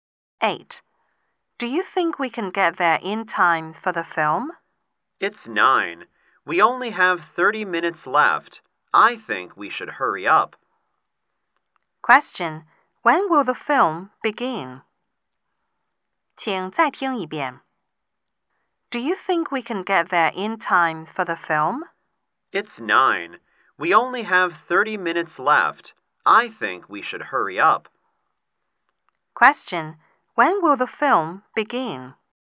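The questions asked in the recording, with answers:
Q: Question. When will the film begin?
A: At 9:30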